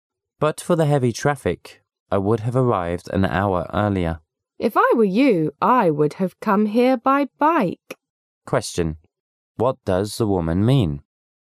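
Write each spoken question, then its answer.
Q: What does the woman mean?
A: The man should have come by bike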